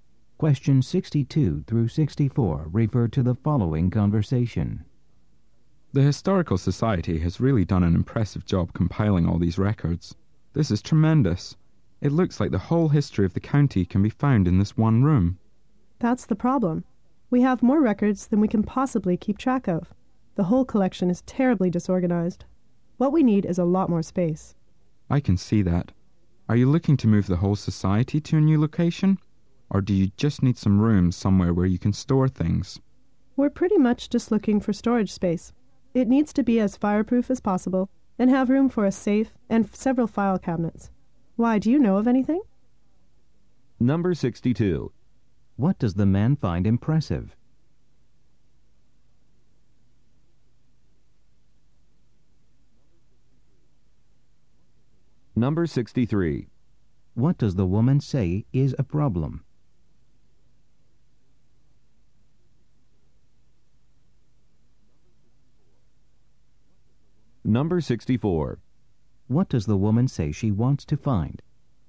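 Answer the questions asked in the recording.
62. The Historical Society's collection of records
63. The collection is disorganized and there is not enough space
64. Fireproof storage space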